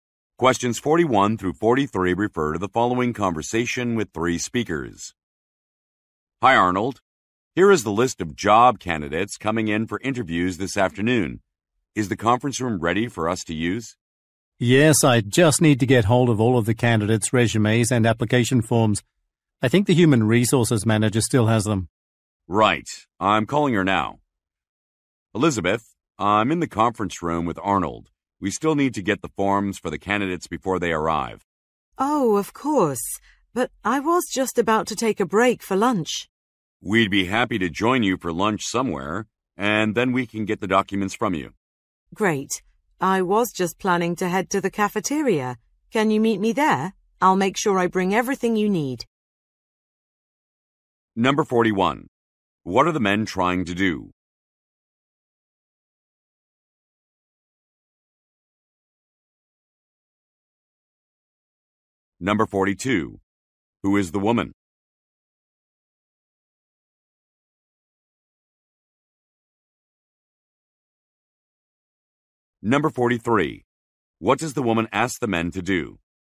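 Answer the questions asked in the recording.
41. Get the candidates' resumes and application forms
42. The human resources manager
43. Meet her in the cafeteria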